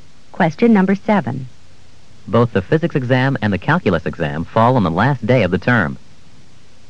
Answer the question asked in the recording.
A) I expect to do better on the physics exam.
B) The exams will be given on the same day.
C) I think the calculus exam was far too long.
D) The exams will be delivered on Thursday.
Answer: B) The exams will be given on the same day.

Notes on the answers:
Both the physics exam and the calculus exam fall on the last day of the term.

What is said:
7. Both the physics exam and the calculus exam fall on the last day of the term.